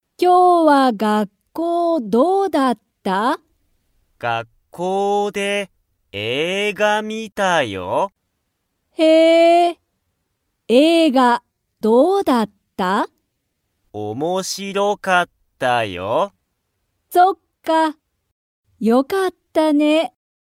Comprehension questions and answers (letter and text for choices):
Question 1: はやとは、学校(がっこう)で____を観(み)た。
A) 友達(ともだち)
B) 先生(せんせい)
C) 部屋(へや)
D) 映画(えいが)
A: D) 映画(えいが)

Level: Level 1